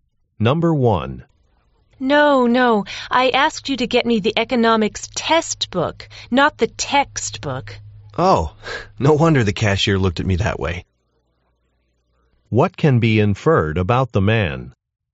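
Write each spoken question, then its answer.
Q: What can be inferred about the man?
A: He bought the wrong book.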